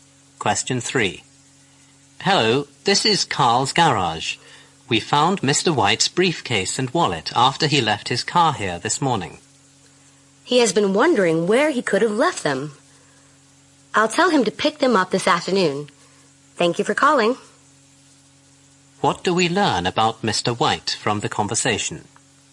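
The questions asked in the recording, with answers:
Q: What do we learn about Mr. White from the conversation?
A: He left his briefcase and wallet at the garage and had been wondering where they were.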